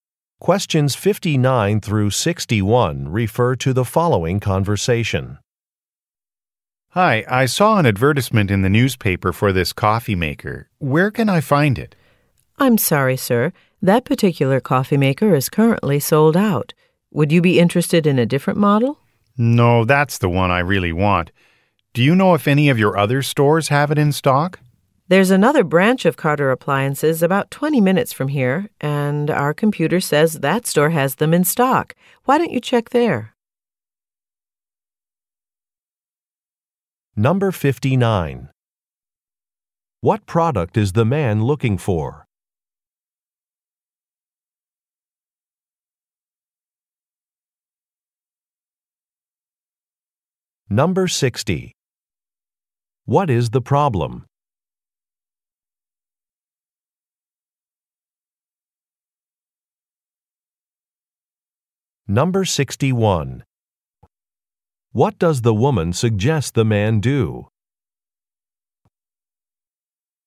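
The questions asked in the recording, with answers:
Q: What product is the man looking for?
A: A coffee maker

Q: What is the problem?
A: It is sold out

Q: What does the woman suggest the man do?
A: Check another Carter Appliances branch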